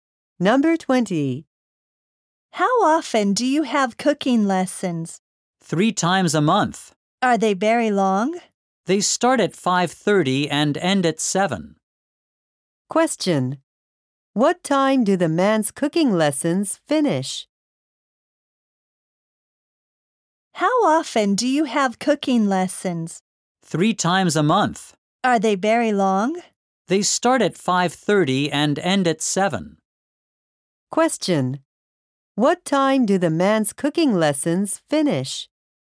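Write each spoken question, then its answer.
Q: What time do the man's cooking lessons finish?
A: At 7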